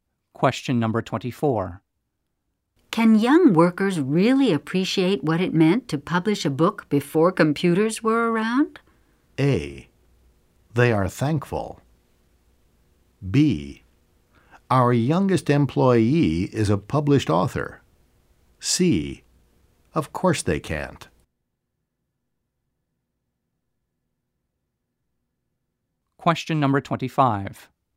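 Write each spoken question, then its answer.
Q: Can young workers really appreciate what it meant to publish a book before computers were around?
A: C: Of course they can't.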